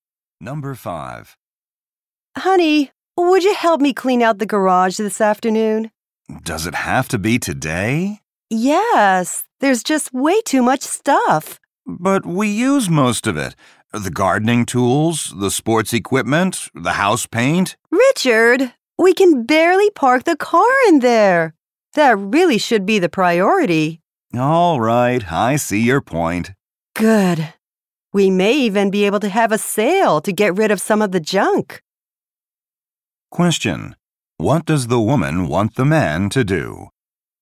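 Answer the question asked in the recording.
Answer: Help her clean out the garage so they can park the car.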